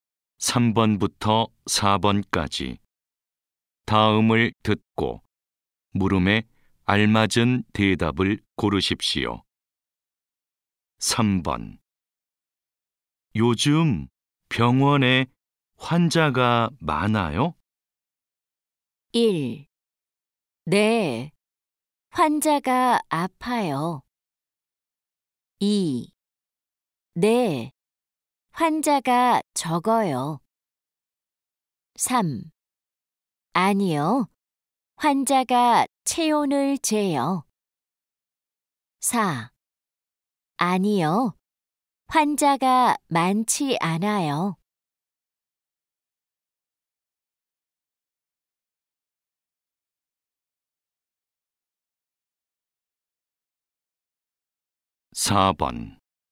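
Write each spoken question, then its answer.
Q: 요즘 병원에 환자가 많아요?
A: 4: 아니요, 환자가 많지 않아요.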